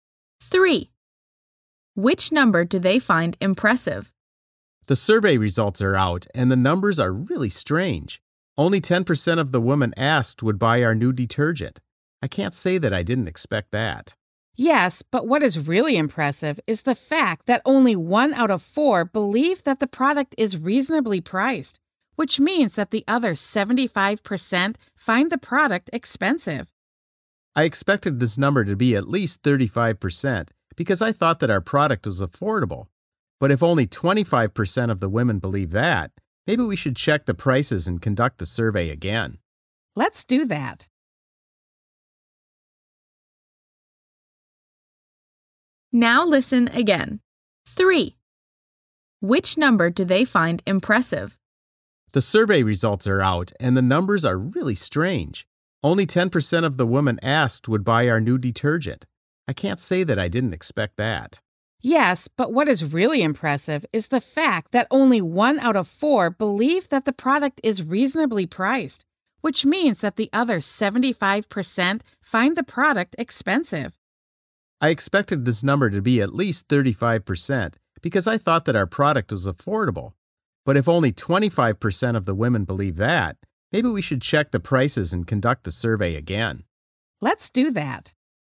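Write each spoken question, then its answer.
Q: Which number do they find impressive?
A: 25%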